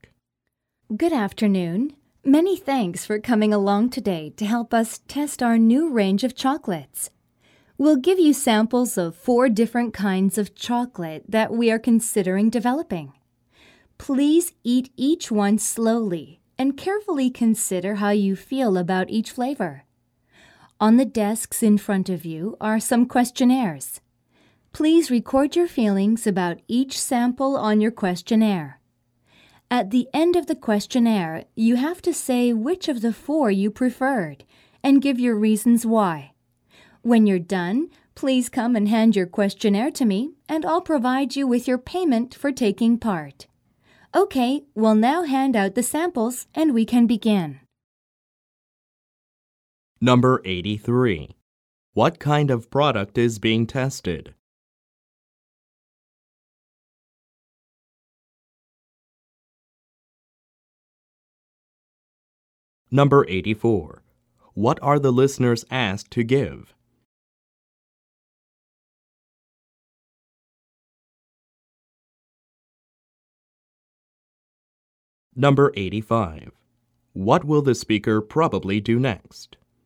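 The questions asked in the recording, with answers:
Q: What kind of product is being tested?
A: Chocolates

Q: What will the speaker probably do next?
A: Hand out the chocolate samples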